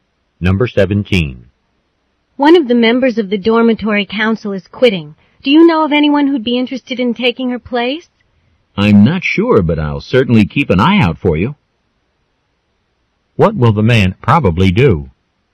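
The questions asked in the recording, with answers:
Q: What will the man probably do?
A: Look for someone to take the council member's place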